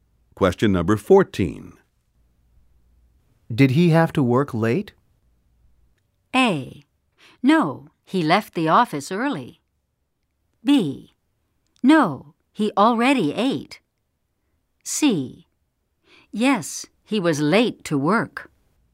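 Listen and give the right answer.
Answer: A: No, he left the office early.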